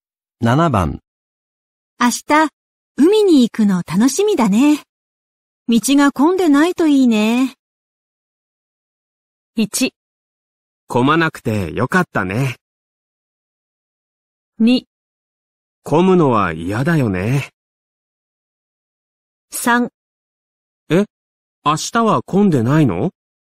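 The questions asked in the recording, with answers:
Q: 明日、海に行くの楽しみだね。道が混んでないといいね。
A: 2: 混むのは嫌だよね。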